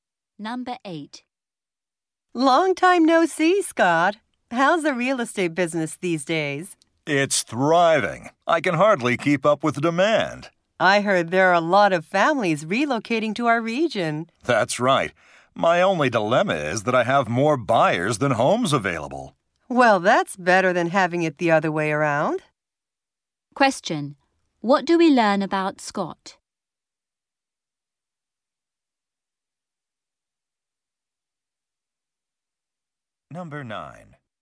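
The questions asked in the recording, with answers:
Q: What do we learn about Scott?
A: He has more buyers than homes available.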